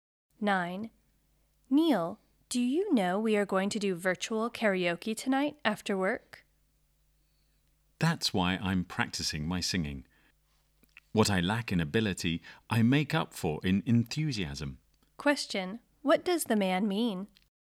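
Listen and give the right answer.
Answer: He isn't a good singer but he is enthusiastic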